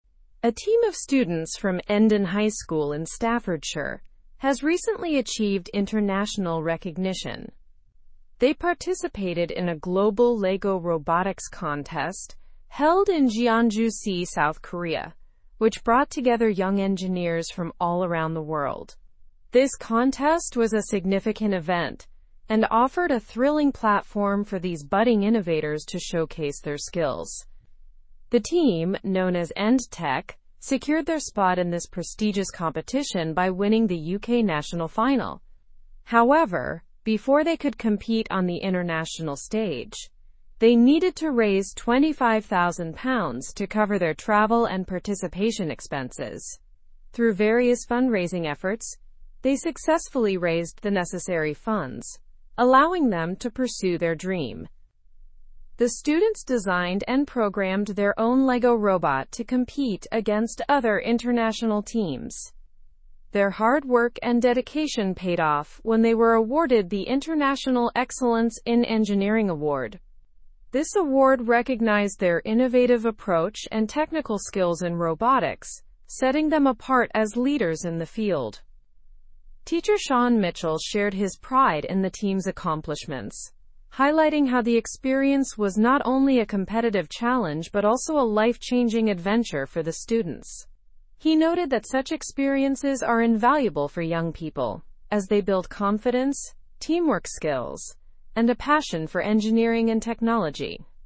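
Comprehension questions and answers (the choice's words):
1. What international event did the students participate in?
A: They participated in the global Lego robotics contest.

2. Where did the competition take place?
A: The competition took place in Jeonju-si, South Korea.

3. What was the name of the team from Endon High School?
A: The team's name was End-Tech.

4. How did the team qualify for the international contest?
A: They won the UK national final.

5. How much money did the team need to raise to attend the contest?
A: The team needed to raise £25,

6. What award did the team receive at the competition?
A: International Excellence in Engineering Award

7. How did teacher Shaun Mitchell feel about the team's success?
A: He expressed pride and excitement

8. What school did the team represent?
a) Endon High School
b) Staffordshire High School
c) Broadway High School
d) Hamilton High School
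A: Endon High School

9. Where was the robotics contest held?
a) Tokyo, Japan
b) Beijing, China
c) Seoul, South Korea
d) Jeonju-si, South Korea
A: Jeonju-si, South Korea

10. What is the name of the team?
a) Lego-Masters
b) Robo-Champs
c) End-Tech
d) Tech-Gurus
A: End-Tech

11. What award did the team win?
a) Global Innovation Award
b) International Excellence in Engineering Award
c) Robotics Mastery Trophy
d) Young Engineers Prize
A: International Excellence in Engineering Award

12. How much money did the team need to raise?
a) £20,000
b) £25,000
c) £30,000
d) £15,000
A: £25,000

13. In what country is Endon High School located?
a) South Korea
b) United States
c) United Kingdom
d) Australia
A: United Kingdom

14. What did the students design and program?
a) A Lego robot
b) A smartphone app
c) A computer game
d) A flying drone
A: A Lego robot

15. Who expressed pride in the team's accomplishments?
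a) Principal John Doe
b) Coach Lisa Turner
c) Mentor Mary Smith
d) Teacher Shaun Mitchell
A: Teacher Shaun Mitchell

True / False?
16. End-Tech received the International Excellence in Engineering Award.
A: True

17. The students are from Endon High School in Staffordshire.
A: True

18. The contest was held in Busan, South Korea.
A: False

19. They had to fundraise £25,000 to attend the competition.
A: True

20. Teacher Shaun Mitchell criticized the team's failures.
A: False

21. The students destroyed a Lego robot for the event.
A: False

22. The End-Tech team withdrew from a local robotics contest.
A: False

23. End-Tech won the UK national final to qualify for the contest.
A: True

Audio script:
A team of students from Endon High School in Staffordshire has recently achieved international recognition. They participated in a global Lego robotics contest held in Jeonju-si, South Korea, which brought together young engineers from all around the world. 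This contest was a significant event and offered a thrilling platform for these budding innovators to showcase their skills.
The team, known as End-Tech, secured their spot in this prestigious competition by winning the UK national final. However, before they could compete on the international stage, they needed to raise £25,000 to cover their travel and participation expenses. Through various fundraising efforts, they successfully raised the necessary funds, allowing them to pursue their dream.
The students designed and programmed their own Lego robot to compete against other international teams. Their hard work and dedication paid off when they were awarded the International Excellence in Engineering Award. This award recognized their innovative approach and technical skills in robotics, setting them apart as leaders in the field.
Teacher Shaun Mitchell shared his pride in the team's accomplishments, highlighting how the experience was not only a competitive challenge but also a life-changing adventure for the students. 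He noted that such experiences are invaluable for young people, as they build confidence, teamwork skills, and a passion for engineering and technology.

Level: Level 3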